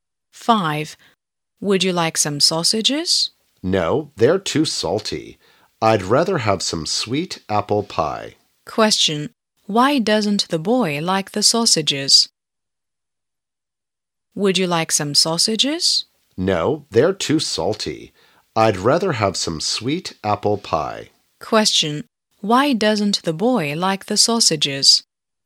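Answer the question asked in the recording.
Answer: They're too salty.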